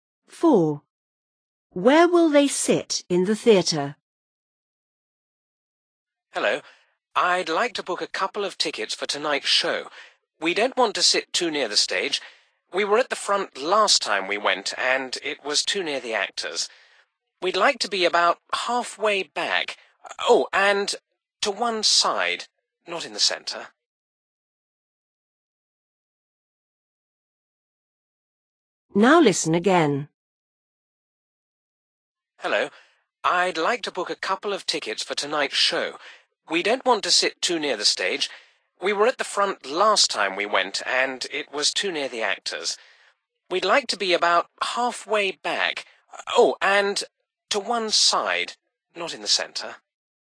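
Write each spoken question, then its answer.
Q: Where will they sit in the theatre?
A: About halfway back, to one side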